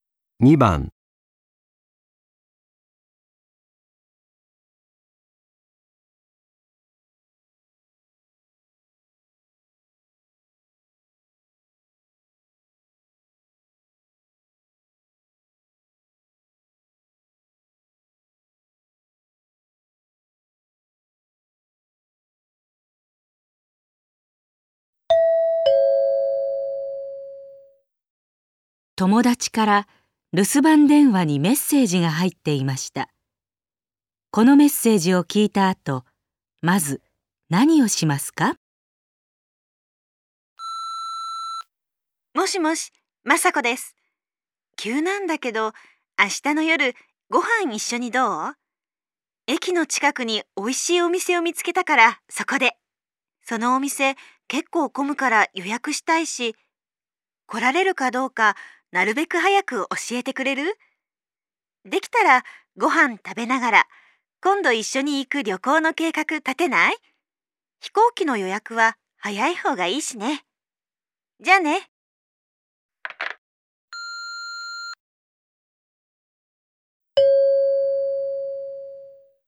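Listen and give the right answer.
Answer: 明日の夕食に行けるかどうか雅子に連絡する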